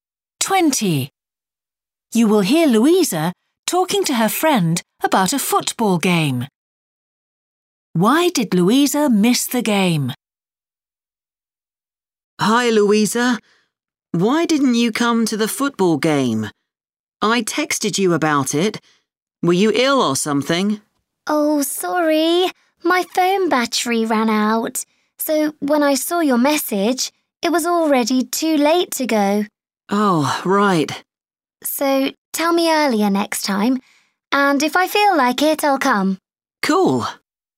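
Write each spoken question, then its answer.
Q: Why did Louisa miss the game?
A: Her phone battery ran out so she saw the message too late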